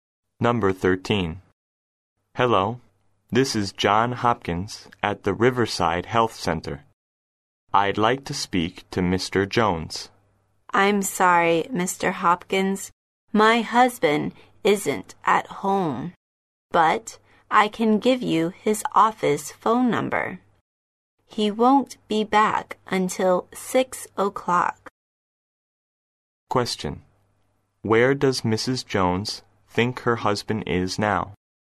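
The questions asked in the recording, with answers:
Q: Where does Mrs. Jones think her husband is now?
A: At his office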